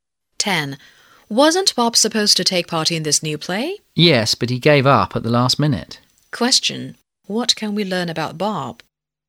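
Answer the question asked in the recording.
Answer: He dropped out of the play at the last minute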